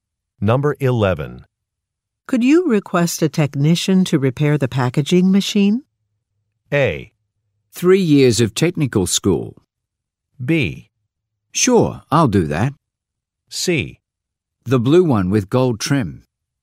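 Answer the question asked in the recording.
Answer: B: Sure, I'll do that.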